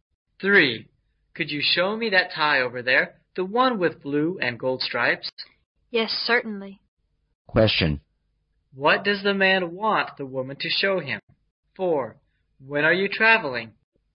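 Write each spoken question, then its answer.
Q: What does the man want the woman to show him?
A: The tie with blue and gold stripes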